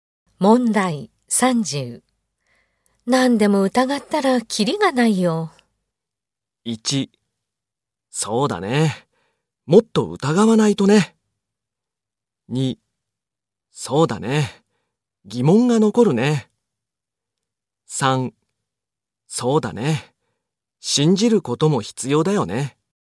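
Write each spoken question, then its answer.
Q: 何でも疑ったらキリがないよ。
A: 3: そうだね。信じることも必要だよね。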